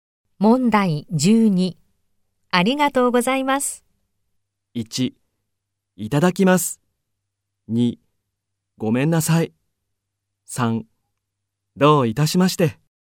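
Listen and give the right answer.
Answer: 3: どういたしまして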